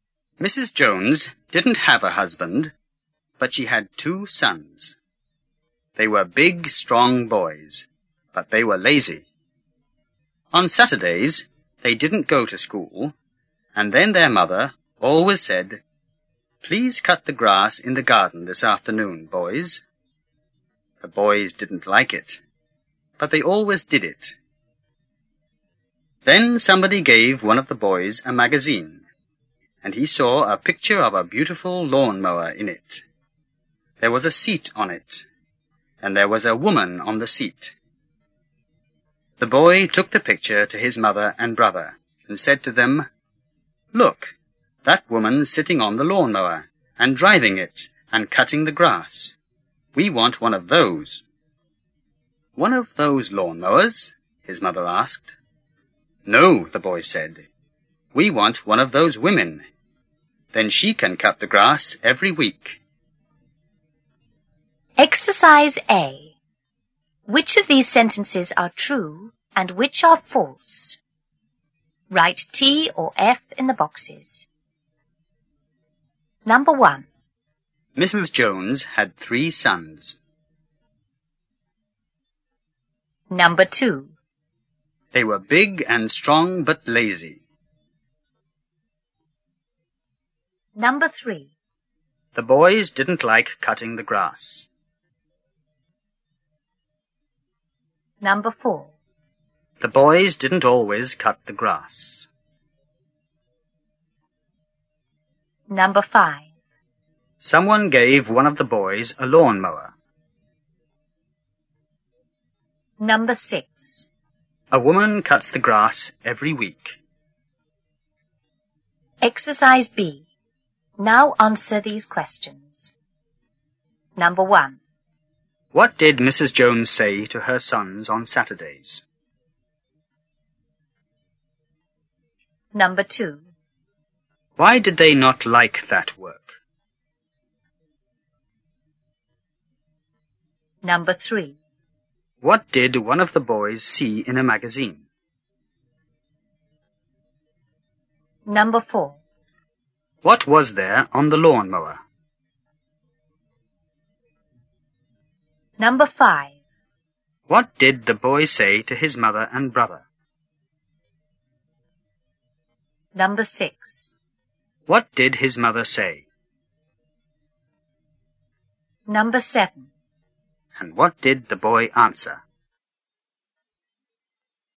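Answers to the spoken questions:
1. False
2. True
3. True
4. False
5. False
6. False
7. Please cut the grass in the garden this afternoon, boys.
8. Because they were lazy.
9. A picture of a beautiful lawnmower.
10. A seat, with a woman on it.
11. Look, that woman's sitting on the lawnmower and cutting the grass. We want one of those.
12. One of those lawnmowers?
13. No, we want one of those women. Then she can cut the grass every week.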